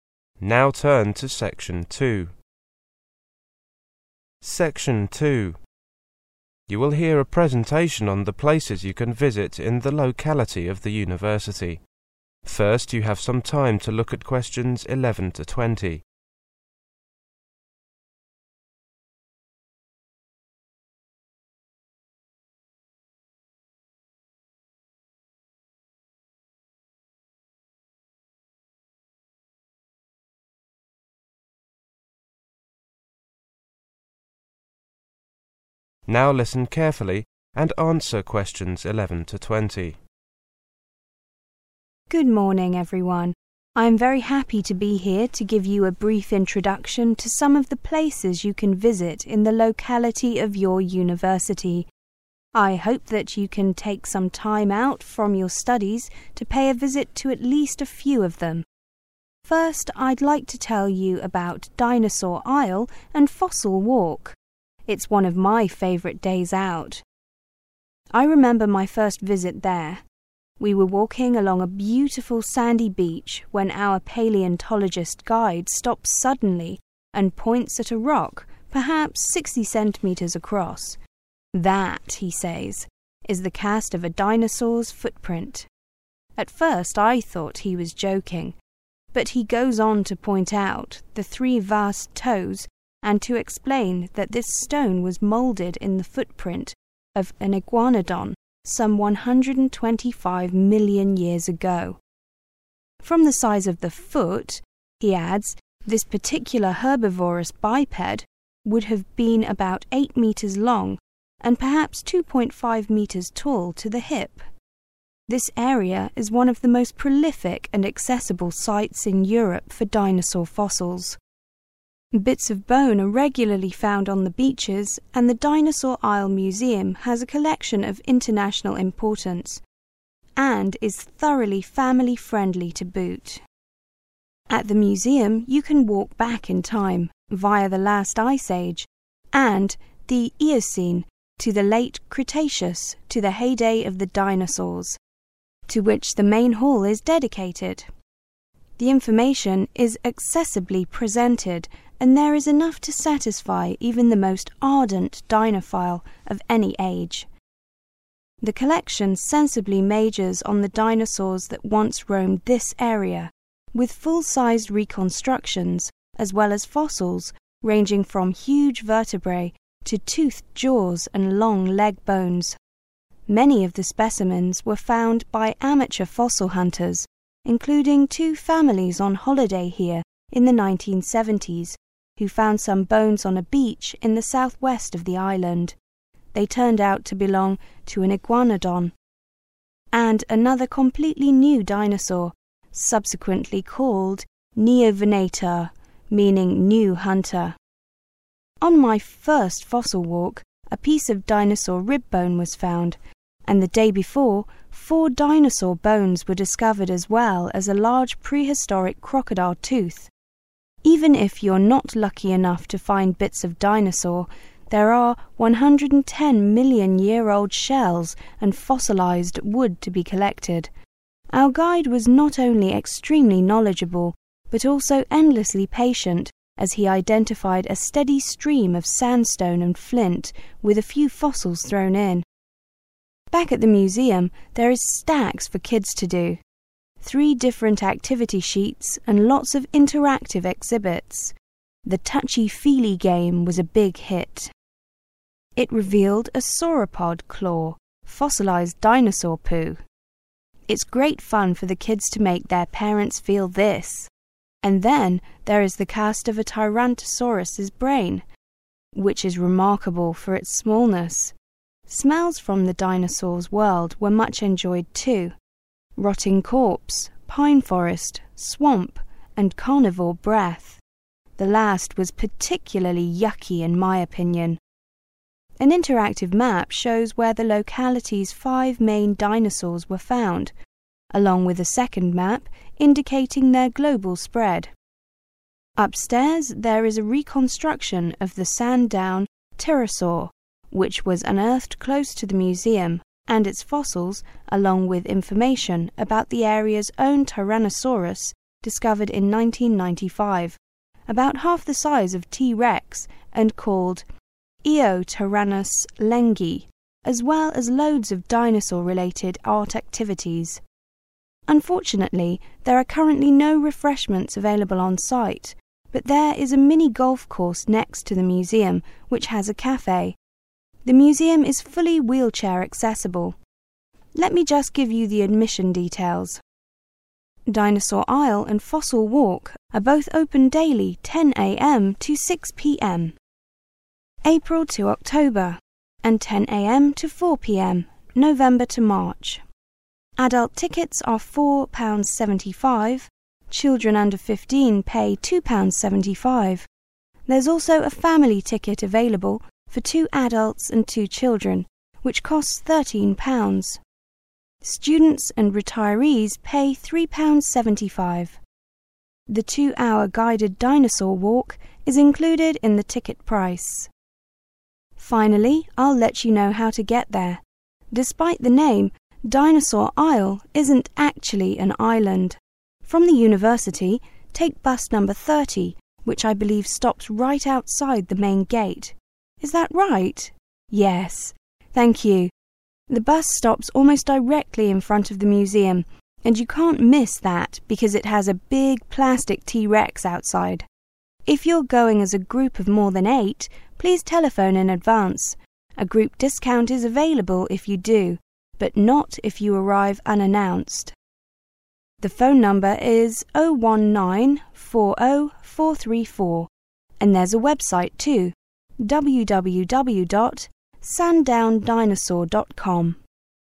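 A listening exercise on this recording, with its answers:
Complete the following sentences using NO MORE THAN TWO WORDS for each gap.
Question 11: On the beach there was a cast of a ________________.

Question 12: The area is one of the best in Europe for finding ________________.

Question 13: The museum contains reconstructions that are ________________.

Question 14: Neovenator means ________________.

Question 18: Children 18. ___________ — £2.75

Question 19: Bus number 30 from the 19. ___________of the university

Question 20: 20. ___________for groups of 8 or more, if booked in advance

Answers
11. dinosaur's footprint
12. dinosaur fossils
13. full-sized
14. new hunter
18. under 15
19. main gate
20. discount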